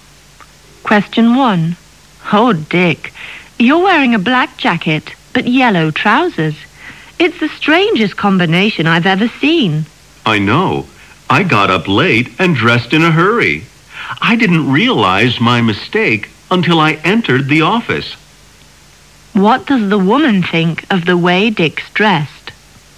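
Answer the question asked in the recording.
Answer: It's very strange; the jacket and trousers don't match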